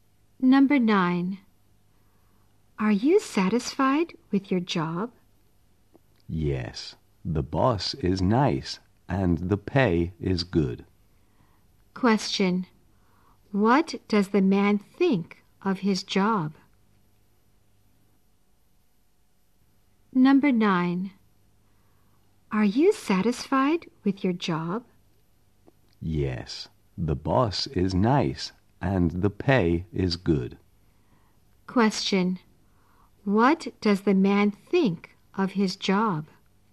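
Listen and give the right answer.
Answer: He is satisfied with it; the boss is nice and the pay is good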